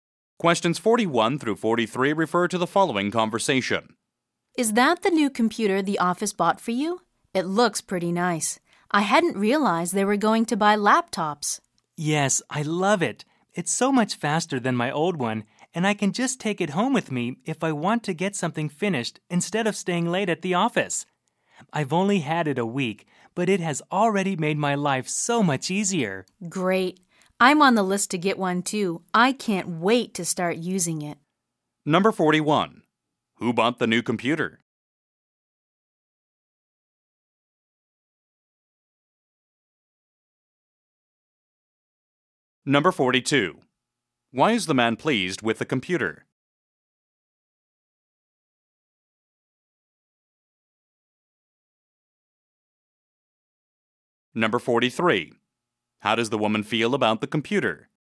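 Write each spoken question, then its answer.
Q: Who bought the new computer?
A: The office

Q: Why is the man pleased with the computer?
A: It is much faster and he can take it home

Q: How does the woman feel about the computer?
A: She is eager to get and use one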